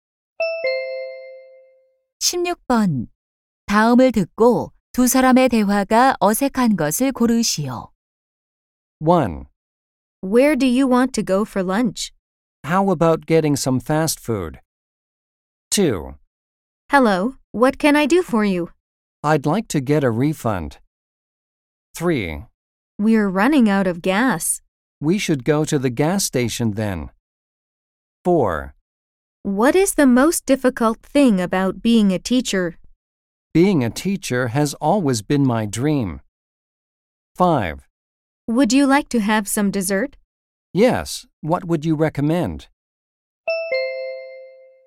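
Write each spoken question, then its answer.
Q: 다음을 듣고 두 사람의 대화가 어색한 것을 고르시오.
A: 4: What is the most difficult thing about being a teacher? / Being a teacher has always been my dream.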